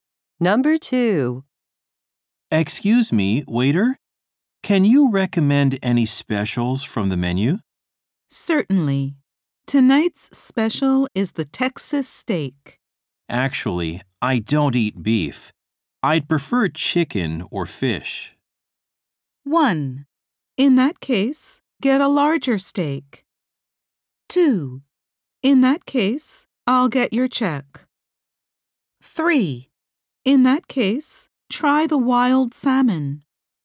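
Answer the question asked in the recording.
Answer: 3: In that case, try the wild salmon.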